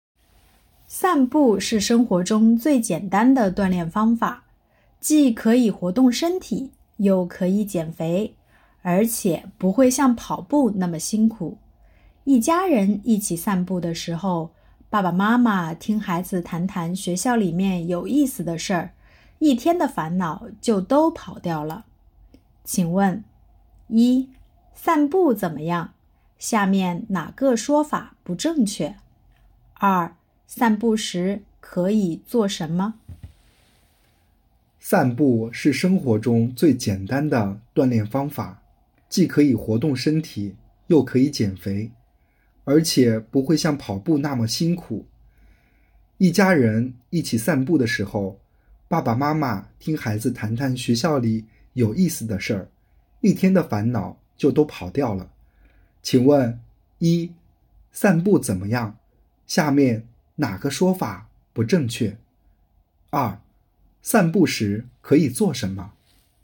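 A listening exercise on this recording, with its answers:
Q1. 散步时可以做什么?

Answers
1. 一家人聊天,听孩子谈学校里有意思的事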